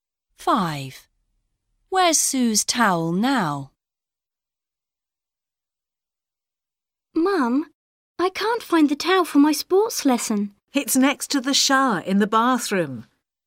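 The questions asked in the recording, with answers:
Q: Where's Sue's towel now?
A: Next to the shower in the bathroom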